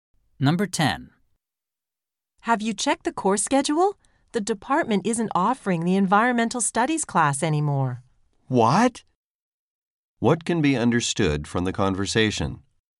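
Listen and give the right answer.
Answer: The environmental studies class is no longer offered.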